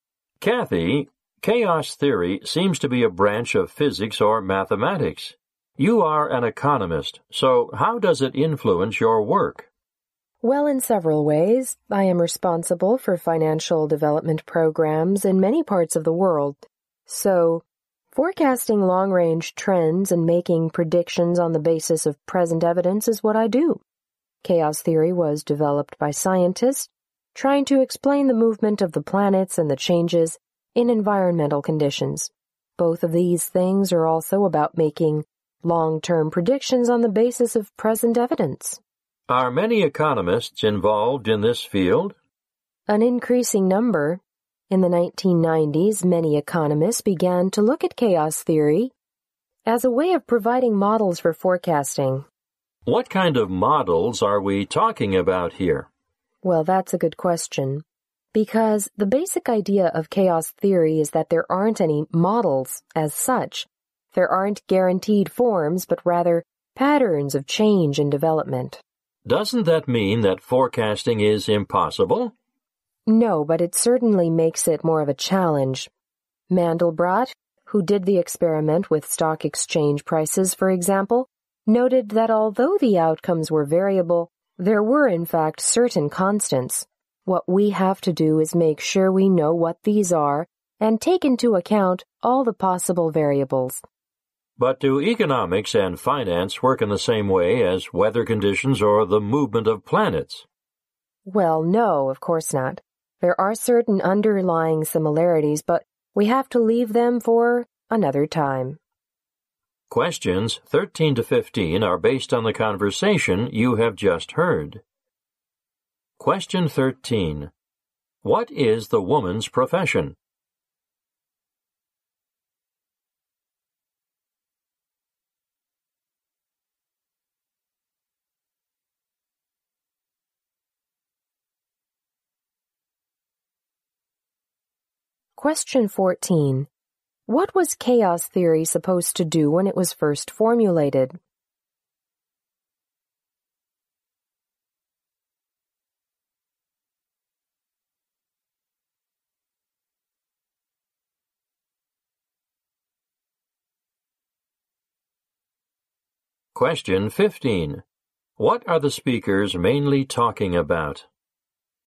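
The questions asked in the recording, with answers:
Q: What is the woman's profession?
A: She is an economist.

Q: What was chaos theory supposed to do when it was first formulated?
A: Explain the movement of the planets and changes in environmental conditions.

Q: What are the speakers mainly talking about?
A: How chaos theory is applied to economic forecasting.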